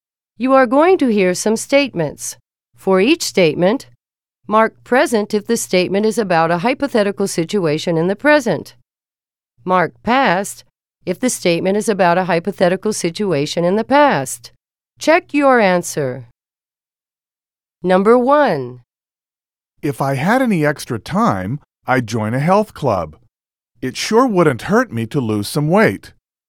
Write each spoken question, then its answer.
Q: If I had any extra time, I'd join a health club.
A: Present is the correct answer.